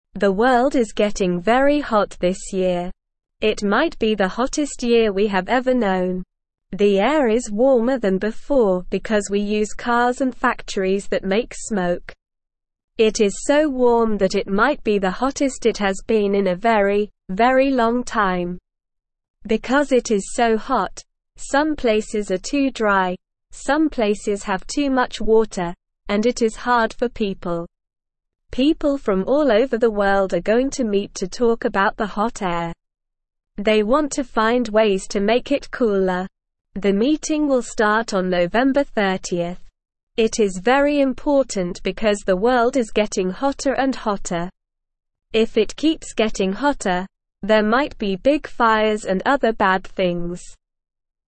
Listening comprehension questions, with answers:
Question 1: It might be the hottest year we have ever (1)______.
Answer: known

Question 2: The air is warmer than before because we use cars and (2)______ that make smoke.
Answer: factories

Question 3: It is so warm that it might be the (3)______ it has been in a very, very long time.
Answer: hottest

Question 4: Because it is so hot, some places are too dry, some places (4)______ too much water, and it is (5)______ for people.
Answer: have

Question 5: Because it is so hot, some places are too dry, some places (4)______ too much water, and it is (5)______ for people.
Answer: hard

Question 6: People from all over the world are going to (6)______ to talk about the hot air.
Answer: meet

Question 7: It is very important because the (7)______ is getting hotter and hotter.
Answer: world

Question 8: If it keeps getting hotter, there might be big (8)______ and other bad things.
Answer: fires

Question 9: Why is the air getting warmer?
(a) Because of bicycles and parks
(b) Because of boats and beaches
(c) Because of trains and forests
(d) Because of cars and factories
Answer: (d) Because of cars and factories

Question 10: What are people going to talk about at the meeting?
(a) What to wear in the hot weather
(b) How to make the air cooler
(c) How to make more smoke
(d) What to cook for dinner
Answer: (b) How to make the air cooler

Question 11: When will the meeting start?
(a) November 30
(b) December 25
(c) October 15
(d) January 1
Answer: (a) November 30

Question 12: Why is it important to have the meeting?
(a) Because people want to go on vacation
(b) Because the world is getting hotter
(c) Because it's fun to talk about the weather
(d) Because they want to have a party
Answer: (b) Because the world is getting hotter

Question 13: What might happen if the world keeps getting hotter?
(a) Snow and ice cream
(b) Rainbows and unicorns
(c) Flowers and sunshine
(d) Big fires and other bad things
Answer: (d) Big fires and other bad things

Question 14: What are some places experiencing because of the hot air?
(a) Some places have too much ice cream, some places have too many toys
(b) Some places have too many flowers, some places have too many rainbows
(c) Some places are too dry, some places have too much water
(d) Some places have too much snow, some places have too much sunshine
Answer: (c) Some places are too dry, some places have too much water

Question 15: What are some things that make the air warmer?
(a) Cars and factories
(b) Bicycles and parks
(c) Boats and beaches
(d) Trains and forests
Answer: (a) Cars and factories

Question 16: What do people want to find ways to do at the meeting?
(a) Make the air warmer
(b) Make the air smell better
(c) Make the air cooler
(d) Make the air more colorful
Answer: (c) Make the air cooler

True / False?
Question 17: People from all over the world are going to meet to talk about the hot air.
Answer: True

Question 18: If it keeps getting hotter, there might not be big fires and other bad things.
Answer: False

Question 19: The world is not getting very hot this year.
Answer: False

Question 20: The air is cooler than before because we use cars and factories that make smoke.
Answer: False

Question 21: They want to find ways to make it cooler.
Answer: True

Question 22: The meeting will not start on November 30.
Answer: False

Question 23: Some places are too dry, and some places have too much water because of the heat.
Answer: True

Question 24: It might be the hottest year we have ever known.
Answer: True

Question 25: What is happening to the world this year?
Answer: The world is getting very hot this year.

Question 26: Why is the air warmer than before?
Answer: The air is warmer because we use cars and factories that make smoke.

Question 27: What happens because it is so warm?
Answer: Some places are too dry, some places have too much water, and it is hard for people.

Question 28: Why do people want to meet?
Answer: People want to meet to find ways to make the world cooler.

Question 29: What might happen if it keeps getting hotter?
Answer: There might be big fires and other bad things.

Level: Level 1

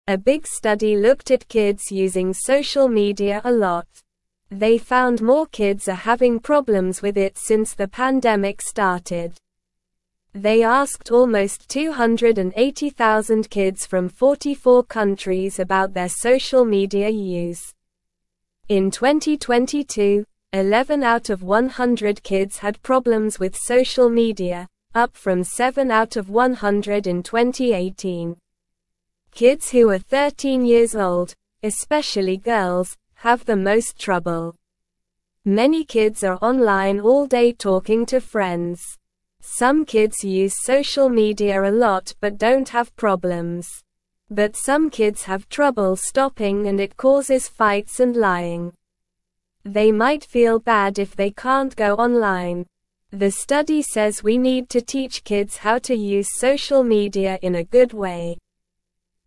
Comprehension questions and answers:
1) A big (1)______ looked at kids using social (2)______ a lot.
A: study

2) A big (1)______ looked at kids using social (2)______ a lot.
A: media

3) They asked almost 280,000 kids from 44 countries about their (3)______ media use.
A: social

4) Kids who are 13 (4)______ old, especially girls, have the most trouble.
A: years

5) (5)______ kids are online all day (6)______ to friends.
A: Many

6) (5)______ kids are online all day (6)______ to friends.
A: talking

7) But some kids have trouble stopping and it (7)______ fights and lying.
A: causes

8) The study (8)______ we need to teach kids how to use social media in a good way.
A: says

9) What did the big study look at?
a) Kids playing outside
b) Kids reading books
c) Kids using social media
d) Kids eating ice cream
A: c) Kids using social media

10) How many kids were asked in the study?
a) Almost 100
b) Almost 50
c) Almost 280,000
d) Almost 500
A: c) Almost 280,000

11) Which age group of kids has the most trouble with social media?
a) 8 years old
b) 13 years old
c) 5 years old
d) 18 years old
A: b) 13 years old

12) What might happen if kids have trouble stopping using social media?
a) Eating ice cream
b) Fights and lying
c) Playing outside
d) Reading books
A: b) Fights and lying

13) What do some kids feel if they can't go online?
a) Happy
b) Excited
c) Sleepy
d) Bad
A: d) Bad

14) What does the study say we need to teach kids?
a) How to use social media in a good way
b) How to eat ice cream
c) How to play outside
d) How to read books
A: a) How to use social media in a good way

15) What are some kids doing all day online?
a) Eating pizza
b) Watching TV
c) Sleeping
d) Talking to friends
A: d) Talking to friends

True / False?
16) 13-year-old kids, especially girls, have the most trouble with social media.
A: True

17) In 2022, 11 out of 100 kids had problems with social media.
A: True

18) Almost 280,000 adults from 44 countries were asked about their social media use.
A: False

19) The study says we don't need to teach kids how to use social media in a good way.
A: False

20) Some kids are offline all day talking to friends.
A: False

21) This number went down from 7 out of 100 in 2018.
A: False

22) A study looked at many kids who use social media a lot.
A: True

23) More kids are having problems with social media since the pandemic started.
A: True

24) What did a big study look at about kids and social media?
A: The study looked at how kids use social media.

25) What do some kids do all day on social media?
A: Some kids spend all day talking to friends on social media.

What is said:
A big study looked at kids using social media a lot. They found more kids are having problems with it since the pandemic started. They asked almost 280,000 kids from 44 countries about their social media use. In 2022, 11 out of 100 kids had problems with social media, up from 7 out of 100 in 2018. Kids who are 13 years old, especially girls, have the most trouble.
Many kids are online all day talking to friends. Some kids use social media a lot but don't have problems. But some kids have trouble stopping and it causes fights and lying. They might feel bad if they can't go online. The study says we need to teach kids how to use social media in a good way.

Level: Level 1

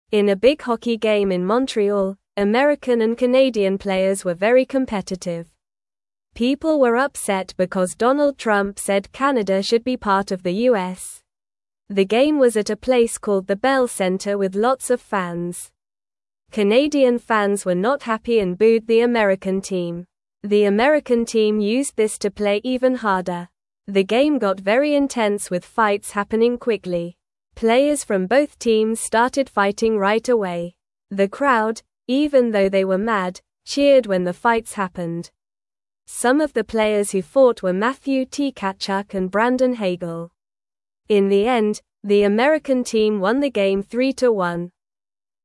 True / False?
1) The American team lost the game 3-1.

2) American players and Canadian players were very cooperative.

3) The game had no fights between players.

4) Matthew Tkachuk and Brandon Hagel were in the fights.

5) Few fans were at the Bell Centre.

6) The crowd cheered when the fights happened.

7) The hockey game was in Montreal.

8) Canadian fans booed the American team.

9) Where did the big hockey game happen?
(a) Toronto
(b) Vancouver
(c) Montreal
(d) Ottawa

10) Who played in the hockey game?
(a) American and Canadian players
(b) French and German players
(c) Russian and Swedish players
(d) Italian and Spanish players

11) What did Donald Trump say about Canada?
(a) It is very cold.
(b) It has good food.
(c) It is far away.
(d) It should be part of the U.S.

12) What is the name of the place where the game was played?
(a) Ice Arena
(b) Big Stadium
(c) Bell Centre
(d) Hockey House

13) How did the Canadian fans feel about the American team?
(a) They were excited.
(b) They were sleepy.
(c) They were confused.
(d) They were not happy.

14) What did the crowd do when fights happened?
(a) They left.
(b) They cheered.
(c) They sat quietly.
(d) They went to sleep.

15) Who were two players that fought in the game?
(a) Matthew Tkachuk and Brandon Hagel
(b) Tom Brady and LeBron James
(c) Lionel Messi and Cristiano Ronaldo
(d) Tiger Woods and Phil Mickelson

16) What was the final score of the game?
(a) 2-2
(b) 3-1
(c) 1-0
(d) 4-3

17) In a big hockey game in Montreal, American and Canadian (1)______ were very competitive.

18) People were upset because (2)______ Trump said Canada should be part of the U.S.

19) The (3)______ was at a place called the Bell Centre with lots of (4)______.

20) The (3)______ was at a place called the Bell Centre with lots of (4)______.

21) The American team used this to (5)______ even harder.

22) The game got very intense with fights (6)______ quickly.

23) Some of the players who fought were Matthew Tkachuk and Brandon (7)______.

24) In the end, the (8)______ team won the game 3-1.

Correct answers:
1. False
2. False
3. False
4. True
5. False
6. True
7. True
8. True
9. (c) Montreal
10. (a) American and Canadian players
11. (d) It should be part of the U.S.
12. (c) Bell Centre
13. (d) They were not happy.
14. (b) They cheered.
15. (a) Matthew Tkachuk and Brandon Hagel
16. (b) 3-1
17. players
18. Donald
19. game
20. fans
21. play
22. happening
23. Hagel
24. American

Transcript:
In a big hockey game in Montreal, American and Canadian players were very competitive. People were upset because Donald Trump said Canada should be part of the U.S. The game was at a place called the Bell Centre with lots of fans. Canadian fans were not happy and booed the American team. The American team used this to play even harder.
The game got very intense with fights happening quickly. Players from both teams started fighting right away. The crowd, even though they were mad, cheered when the fights happened. Some of the players who fought were Matthew Tkachuk and Brandon Hagel. In the end, the American team won the game 3-1.

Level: Level 1

